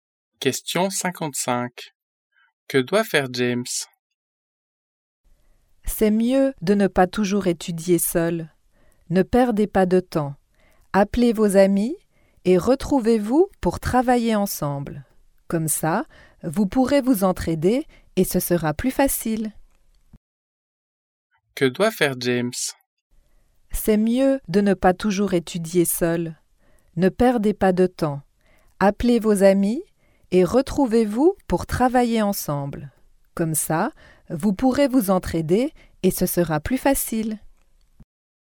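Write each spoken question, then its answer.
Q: Que doit faire James?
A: Appeler ses amis pour étudier ensemble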